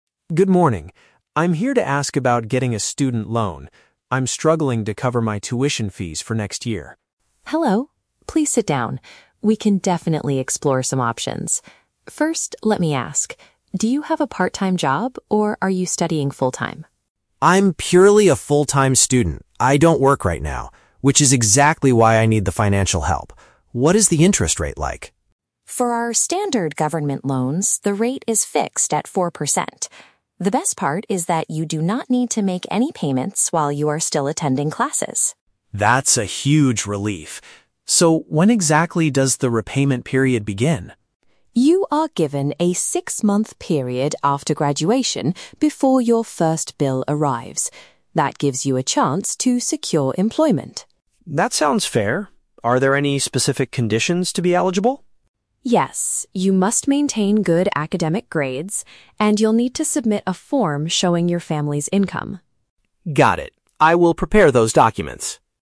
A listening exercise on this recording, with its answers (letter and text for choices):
Listen to the conversation between a student and a financial aid officer, and choose the correct answer (A, B, or C) for each question.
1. Why is Alex applying for the loan?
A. He wants to quit his current part-time job.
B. He needs money to pay for his university courses.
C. He is looking for funds to start a new business.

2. When must Alex begin returning the borrowed money?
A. While he is still taking his regular classes.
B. Immediately after he receives his university degree.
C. Half a year after he finishes his academic studies.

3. What is one of the requirements for Alex to get the financial support?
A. Keeping his school marks at a satisfactory level.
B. Asking his parents to visit the financial office.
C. Having an excellent previous employment record.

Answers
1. B. He needs money to pay for his university courses.
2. C. Half a year after he finishes his academic studies.
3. A. Keeping his school marks at a satisfactory level.

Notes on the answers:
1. The Key: Alex says he is struggling to cover his "tuition fees". Option B paraphrases "tuition fees" as paying for "university courses". The Trap: Option (A) is a trap. Ms. Carter asks if he has a "part-time job", but Alex explicitly states, "I don't work right now". Option (C) is a plausible reason for a loan but is never mentioned.
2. The Key: Ms. Carter tells him he has a "six-month period after graduation" before his first bill arrives. Option C paraphrases "six-month period after graduation" as "Half a year after he finishes his academic studies". The Trap: Option (A) is the opposite of the truth (the officer says he does not need to make payments while attending classes). Option (B) is a trap because he doesn't have to pay immediately after graduating; he gets a 6-month break.
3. The Key: Ms. Carter says he must "maintain good academic grades". Option A paraphrases "good academic grades" as "school marks at a satisfactory level". The Trap: Option (B) contains the word "parents" (implied by "family's income"), but he only needs to submit a form about their income, not bring them to the office. Option (C) mentions "employment", but Alex is purely a student and doesn't have an employment record yet.

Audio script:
Alex: Good morning. I'm here to ask about getting a student loan. I'm struggling to cover my tuition fees for next year.
Carter: Hello. Please sit down. We can definitely explore some options. First, let me ask: do you have a part-time job, or are you studying full-time?
Alex: I'm purely a full-time student. I don't work right now, which is exactly why I need the financial help. What is the interest rate like?
Carter: For our standard government loans, the rate is fixed at four percent. The best part is that you do not need to make any payments while you are still attending classes.
Alex: That's a huge relief. So, when exactly does the repayment period begin?
Carter: You are given a six-month period after graduation before your first bill arrives. That gives you a chance to secure employment.
Alex: That sounds fair. Are there any specific conditions to be eligible?
Carter: Yes. You must maintain good academic grades, and you'll need to submit a form showing your family's income.